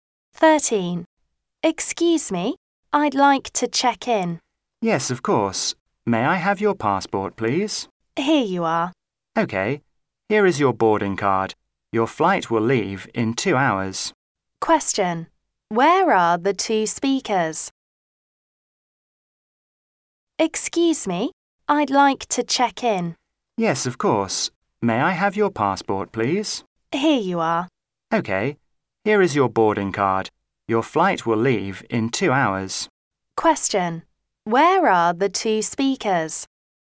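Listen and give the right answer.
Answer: At the airport.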